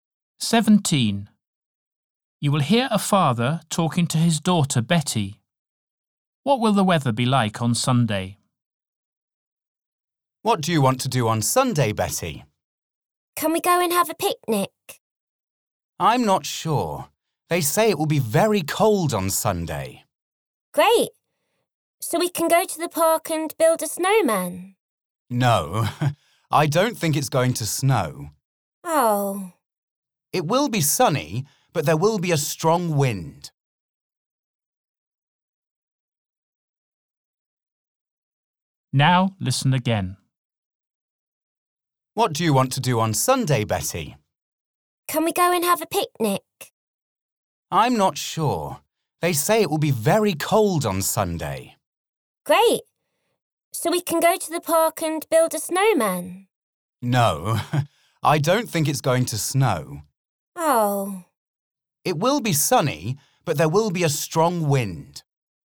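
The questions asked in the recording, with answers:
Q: What will the weather be like on Sunday?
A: Very cold, sunny and windy, with no snow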